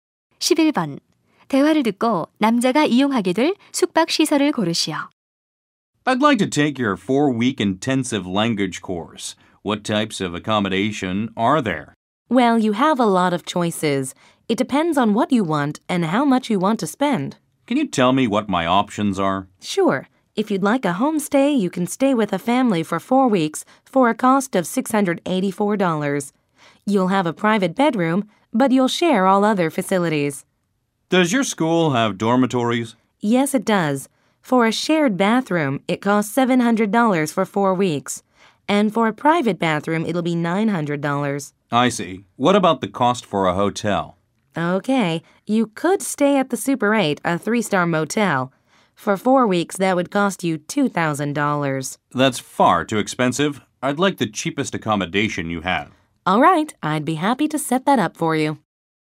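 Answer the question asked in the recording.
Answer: 홈스테이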